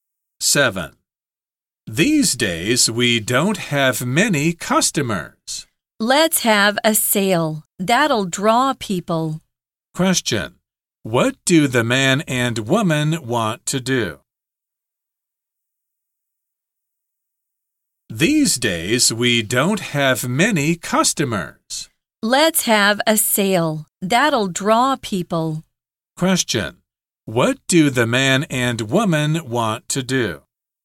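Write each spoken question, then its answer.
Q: Question. What do the man and woman want to do?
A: Have a sale to draw customers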